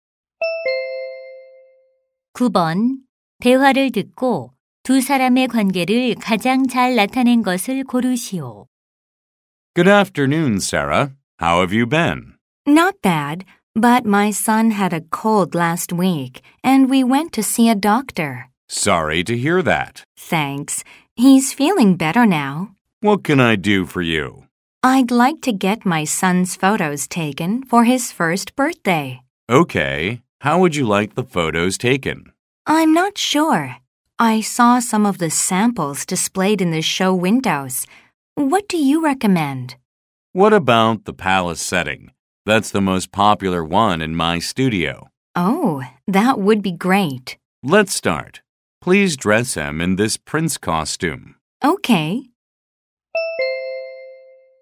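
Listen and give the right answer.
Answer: 사진사와 고객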